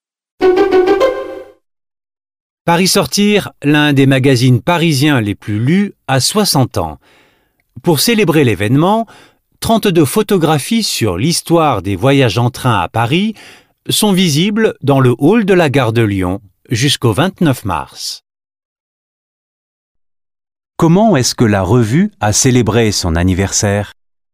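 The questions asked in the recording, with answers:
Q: Comment est-ce que la revue a célébré son anniversaire ?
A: Avec une exposition de 32 photographies sur l'histoire des voyages en train, dans le hall de la gare de Lyon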